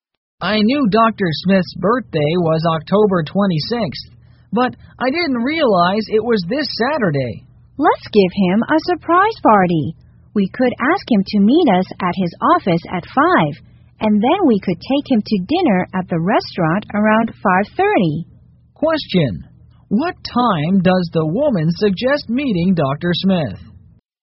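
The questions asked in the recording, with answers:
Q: Question, what time does the woman suggest meeting Dr. Smith?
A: at 5 o'clock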